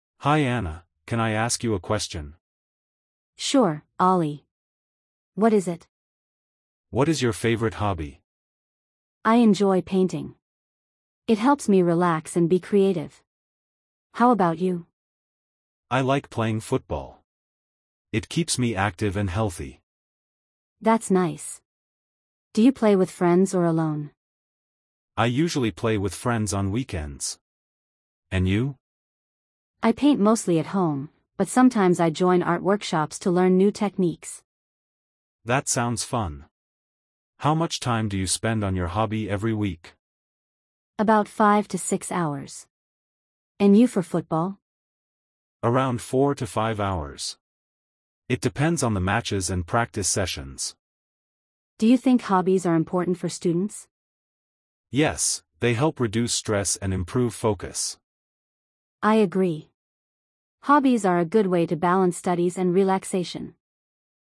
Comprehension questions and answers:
Complete the phrases as you listen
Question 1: Hi Anna, can I ___ you a question?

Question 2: I enjoy ___, it helps me relax and be creative.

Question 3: I like playing ___, it keeps me active and healthy.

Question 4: I usually play with ___ on weekends.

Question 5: About ___ hours per week.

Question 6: Hobbies help reduce ___ and improve focus.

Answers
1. ask
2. painting
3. football
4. friends
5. 5-6
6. stress